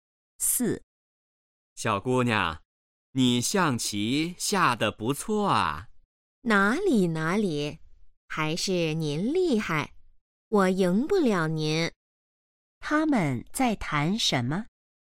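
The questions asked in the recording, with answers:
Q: 他们在谈什么?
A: 下象棋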